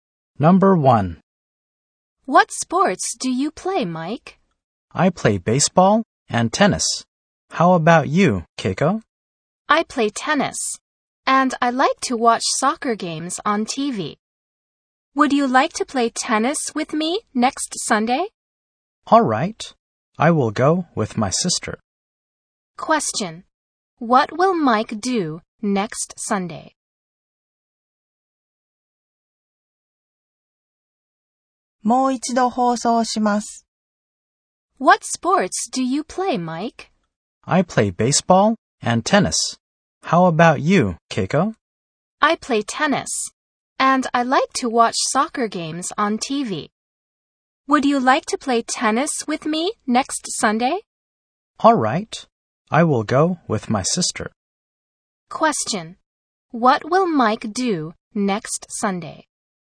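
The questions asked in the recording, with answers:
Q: What will Mike do next Sunday?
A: He will play tennis with Keiko.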